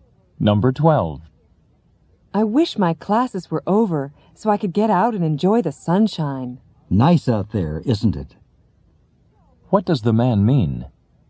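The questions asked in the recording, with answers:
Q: What does the man mean?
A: The weather is nice outside.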